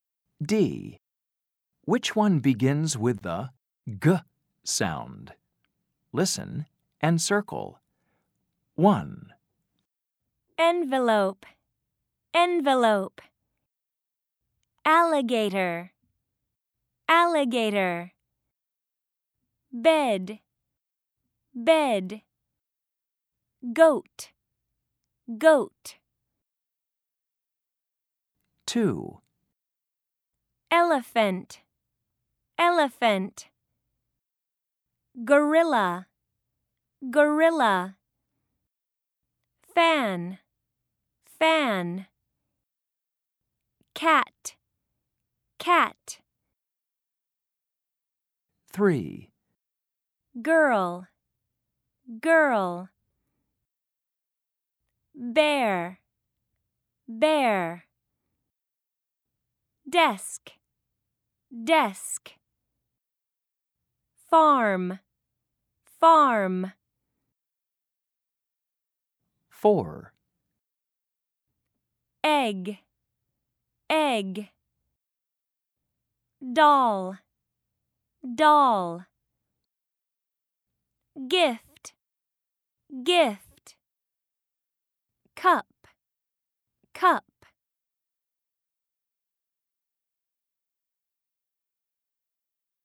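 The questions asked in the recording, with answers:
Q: Which one begins with the G sound?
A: Goat

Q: Which one begins with the G sound?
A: Gorilla

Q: Which one begins with the G sound?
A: Girl

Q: Which one begins with the G sound?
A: Gift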